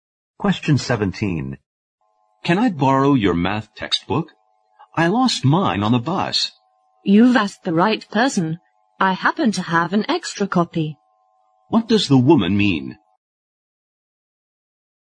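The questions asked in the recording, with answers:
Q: What does the woman mean?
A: She can lend him a math textbook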